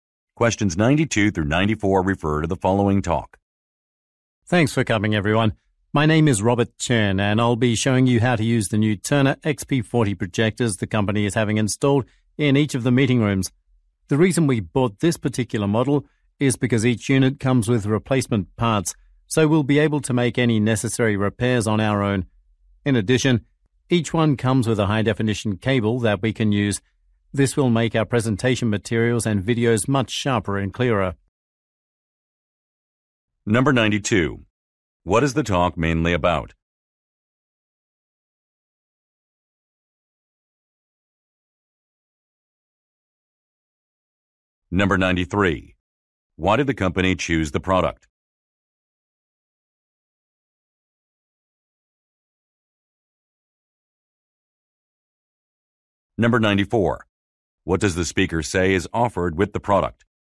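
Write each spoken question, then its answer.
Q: What is the talk mainly about?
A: How to use new projectors

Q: Why did the company choose the product?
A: It comes with replacement parts for self-repair

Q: What does the speaker say is offered with the product?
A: A high-definition cable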